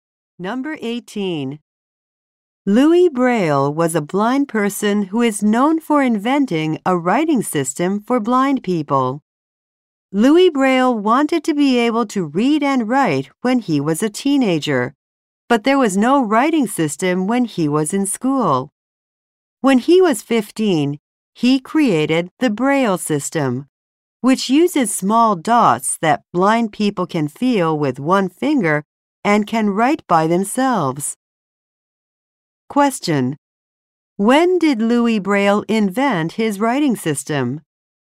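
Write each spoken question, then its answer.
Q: When did Louis Braille invent his writing system?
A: When he was 15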